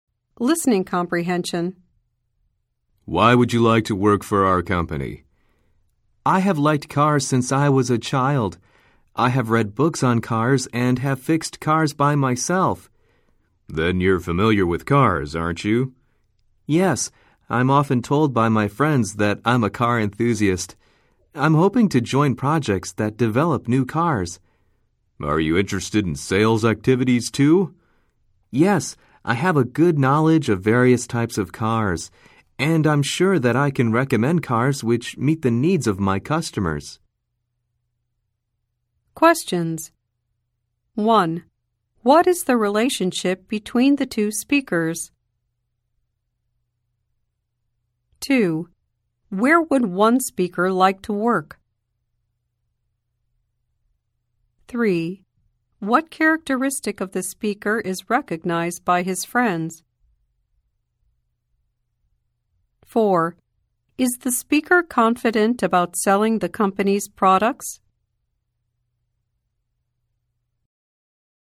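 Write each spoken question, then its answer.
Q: What is the relationship between the two speakers?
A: Interviewer and job applicant

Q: Where would one speaker like to work?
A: At a car company

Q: What characteristic of the speaker is recognized by his friends?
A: He is a car enthusiast

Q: Is the speaker confident about selling the company's products?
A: Yes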